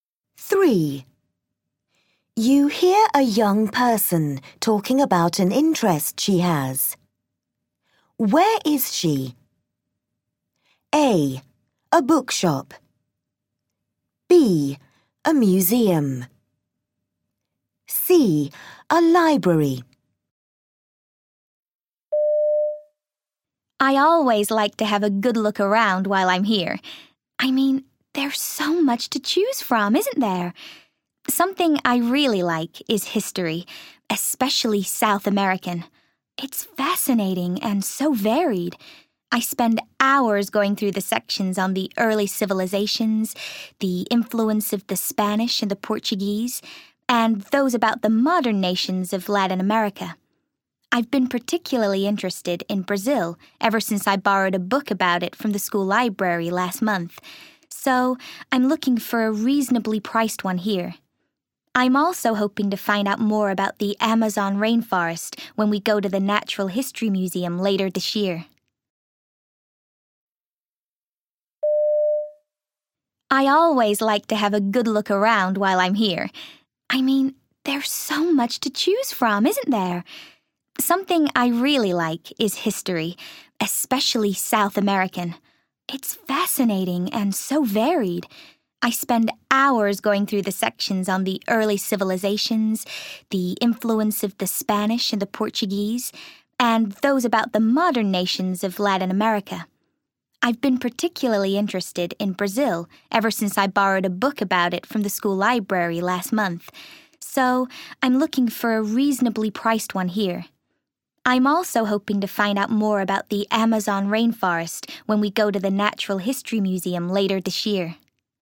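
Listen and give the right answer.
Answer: A: A bookshop.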